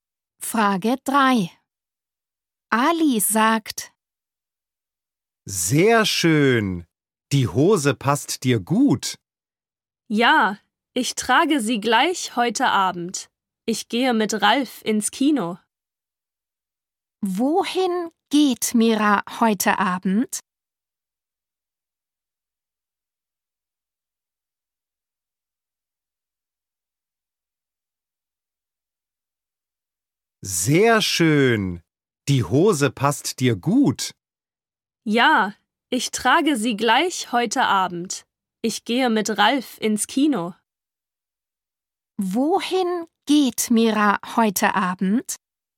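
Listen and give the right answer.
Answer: ins Kino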